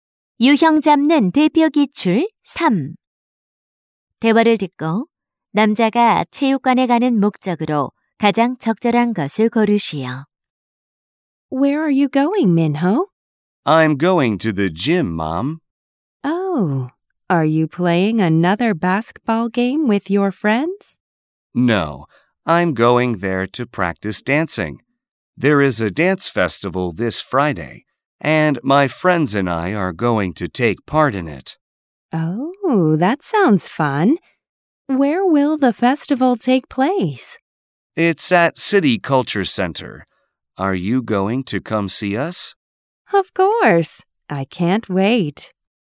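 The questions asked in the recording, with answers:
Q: 대화를 듣고 남자가 체육관에 가는 목적으로 가장 적절한 것을 고르시오.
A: 춤 연습을 하기 위해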